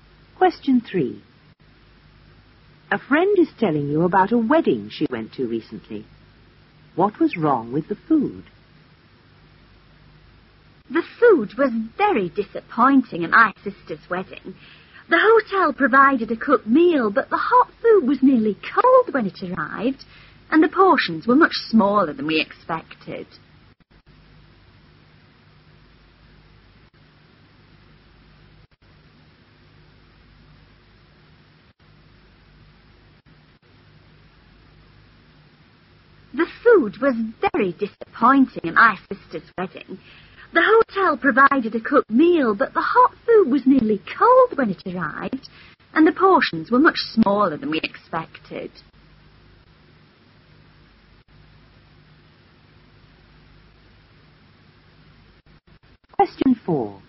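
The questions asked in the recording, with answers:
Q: What was wrong with the food?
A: The hot food was nearly cold and the portions were too small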